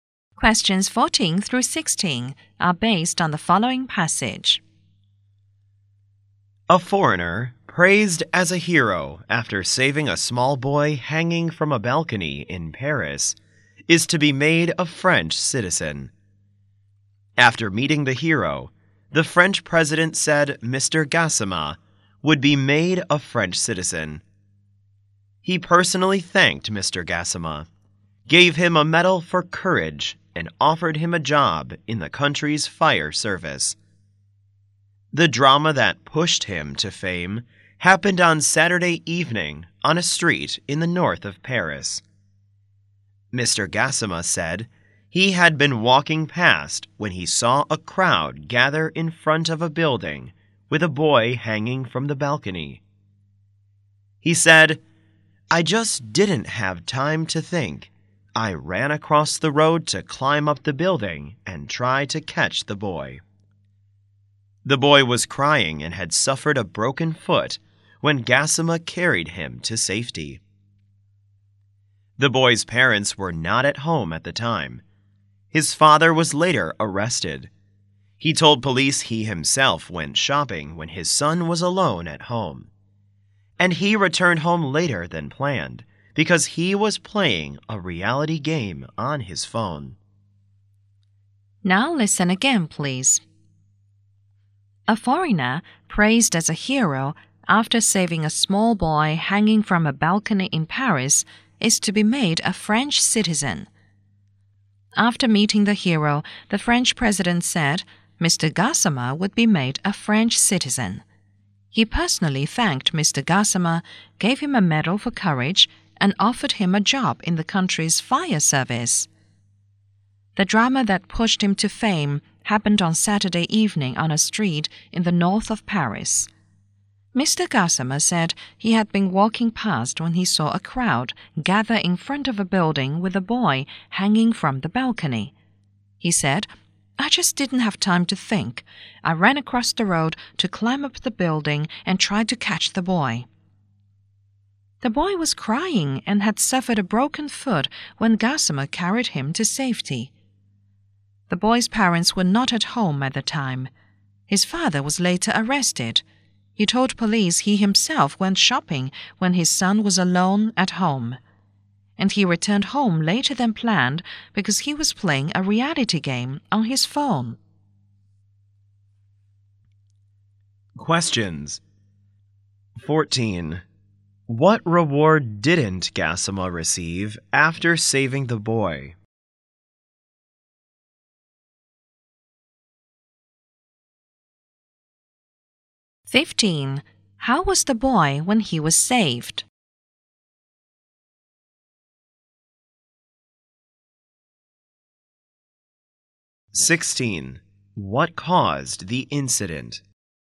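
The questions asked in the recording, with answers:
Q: How was the boy when he was saved?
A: Crying, with a broken foot

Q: What caused the incident?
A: The father left him alone and came home late because he was playing a phone game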